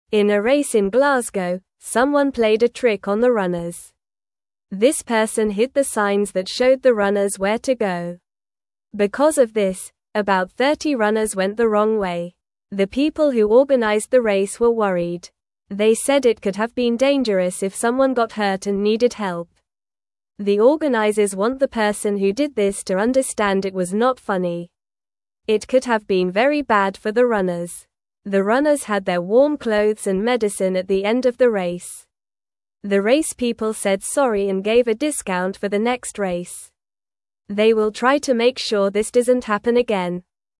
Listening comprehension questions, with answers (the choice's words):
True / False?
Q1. The organizers said it was not funny.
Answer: True

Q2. The race people did not apologize and did not offer a discount for the next race.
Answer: False

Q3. The treat was revealing the signs.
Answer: False

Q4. The race organizers were not worried.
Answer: False

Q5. Runners had warm clothes and medicine at the end.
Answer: True

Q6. There was a race in Glasgow.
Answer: True

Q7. About 30 runners went the wrong way.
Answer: True

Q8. No one played a trick on the runners.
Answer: False

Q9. What did someone hide during the race?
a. Runners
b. Signs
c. Water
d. Food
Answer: Signs

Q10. How many runners went the wrong way?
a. 10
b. 50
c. 20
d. 30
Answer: 30

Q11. What did the race organizers feel?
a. Happy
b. Excited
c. Worried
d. Bored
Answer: Worried

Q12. What did the organizers say could happen?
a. Someone could get hurt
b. Everyone would win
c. It would be fun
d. It would be easy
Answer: Someone could get hurt

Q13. What did the runners have at the end of the race?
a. Toys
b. Snacks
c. Warm clothes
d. Games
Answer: Warm clothes

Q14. What will the organizers try to do?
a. Make it harder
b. Change the place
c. Give more prizes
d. Stop this from happening again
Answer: Stop this from happening again

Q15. In a race in (1)______, someone (2)______ a trick on the runners.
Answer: Glasgow

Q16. In a race in (1)______, someone (2)______ a trick on the runners.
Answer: played

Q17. Because of this, about 30 runners (3)______ the wrong way.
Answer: went

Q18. The people who organized the race were (4)______.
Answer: worried

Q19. The organizers want the person who did this to (5)______ it was not funny.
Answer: understand

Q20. The runners had their warm (6)______ and medicine at the end of the (7)______.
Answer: clothes

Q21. The runners had their warm (6)______ and medicine at the end of the (7)______.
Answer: race

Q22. The race people said sorry and (8)______ a discount for the next race.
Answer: gave

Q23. What did someone hide from the runners?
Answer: Someone hid the signs that showed where to go.

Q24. Why were the race organizers worried?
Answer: They were worried because it could have been dangerous for the runners.

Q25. What did the runners need at the end of the race?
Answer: The runners needed their warm clothes and medicine.

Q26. What will the race organizers try to do in the future?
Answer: They will try to make sure this doesn't happen again.

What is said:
In a race in Glasgow, someone played a trick on the runners. This person hid the signs that showed the runners where to go. Because of this, about 30 runners went the wrong way. The people who organized the race were worried. They said it could have been dangerous if someone got hurt and needed help.
The organizers want the person who did this to understand it was not funny. It could have been very bad for the runners. The runners had their warm clothes and medicine at the end of the race. The race people said sorry and gave a discount for the next race. They will try to make sure this doesn't happen again.

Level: Level 1